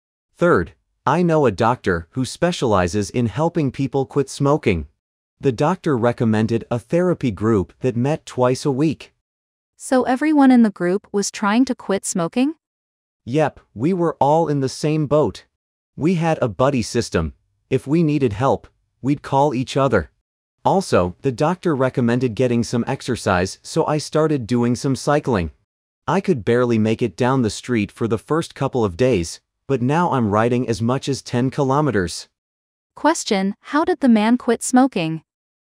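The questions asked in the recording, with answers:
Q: How did the man quit smoking?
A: By joining a therapy group with a buddy system and exercising (cycling)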